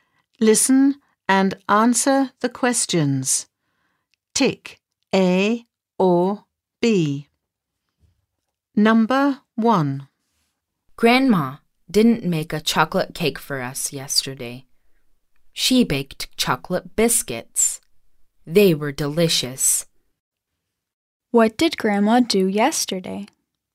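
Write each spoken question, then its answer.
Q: What did Grandma do yesterday?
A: She baked chocolate biscuits.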